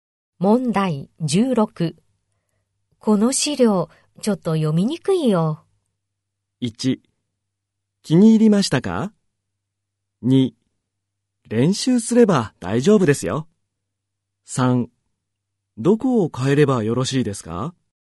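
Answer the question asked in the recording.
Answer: 3: どこを変えればよろしいですか?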